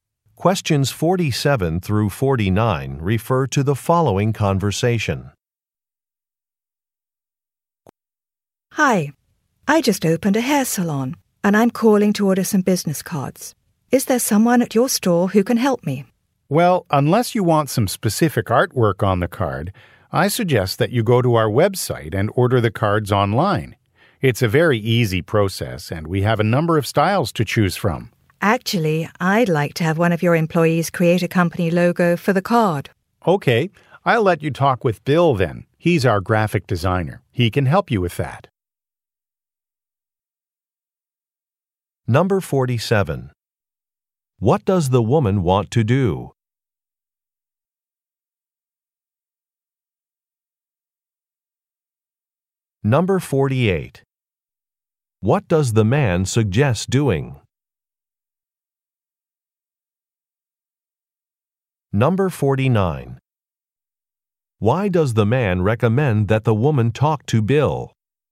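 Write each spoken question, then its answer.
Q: What does the woman want to do?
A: Order business cards

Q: What does the man suggest doing?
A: Ordering the cards online on the website

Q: Why does the man recommend that the woman talk to Bill?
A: He is the graphic designer and can create a logo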